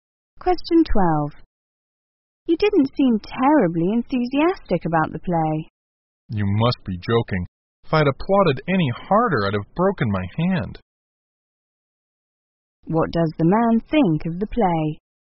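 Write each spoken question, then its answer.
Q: What does the man think of the play?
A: He liked it very much.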